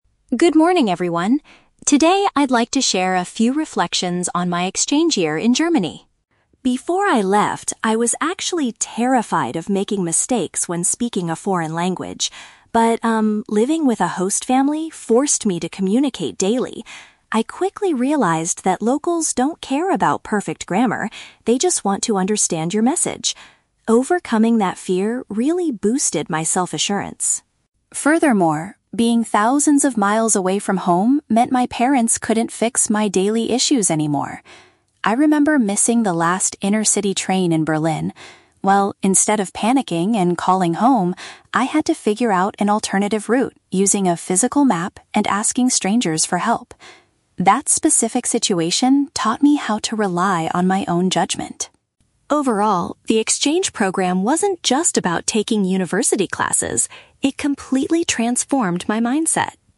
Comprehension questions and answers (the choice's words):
Listen to a third-year university student giving a presentation to her class. Read the questions below and choose the correct answer (A, B, or C) for each.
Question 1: How did the student's attitude toward speaking a foreign language change?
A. She learned how to construct sentences with flawless grammar.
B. She gained confidence by focusing on delivering her message.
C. She avoided talking to locals until her vocabulary was perfect.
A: She gained confidence by focusing on delivering her message.

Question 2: What did the student do when she missed her transport in Berlin?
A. She phoned her parents to ask for immediate advice.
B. She stayed at the station to wait for the morning service.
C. She used a paper guide and spoke to people to find her way.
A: She used a paper guide and spoke to people to find her way.

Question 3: What is the main conclusion the student makes about her time abroad?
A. The experience developed her ability to make her own decisions.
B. The university courses were much more difficult than she expected.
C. The host family helped her understand the local academic system.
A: The experience developed her ability to make her own decisions.

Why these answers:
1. The Key (Correct): The student says that overcoming her fear "boosted my self-assurance" (gained confidence) and that locals "just want to understand your message" (focusing on delivering her message). The Trap: Option (A) is incorrect. The audio mentions "perfect grammar", but the student realizes that locals don't care about it, so she didn't focus on making flawless sentences. Not mentioned: Option (C) is a trap. She was afraid at first, but she never avoided talking; her host family "forced" her to communicate.
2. The Key (Correct): When she missed the train, she found an alternative route using a "physical map" (paper guide) and "asking strangers for help" (spoke to people). The Trap: Option (A) is the exact opposite of what she did. She says she figured it out "instead of panicking and calling home." Not mentioned: Option (B) is a plausible reaction when missing a late train, but she did not wait at the station.
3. The Key (Correct): The student concludes that figuring things out alone taught her how to "rely on my own judgment" (make her own decisions), which transformed her mindset. The Trap: Option (B) mentions "university classes", but the student says the program "wasn't just about" academics, and she never complains about the difficulty. Not mentioned: Option (C) mentions the "host family", but they helped her with daily communication, not the academic system.

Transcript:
Student: Good morning, everyone. Today, I'd like to share a few reflections on my exchange year in Germany.
Before I left, I was actually terrified of making mistakes when speaking a foreign language. But, um, living with a host family forced me to communicate daily. I quickly realized that locals don't care about perfect grammar; they just want to understand your message. Overcoming that fear really boosted my self-assurance.
Furthermore, being thousands of miles away from home meant my parents couldn't fix my daily issues anymore. I remember missing the last intercity train in Berlin. Well, instead of panicking and calling home, I had to figure out an alternative route using a physical map and asking strangers for help. That specific situation taught me how to rely on my own judgment.
Overall, the exchange program wasn't just about taking university classes; it completely transformed my mindset.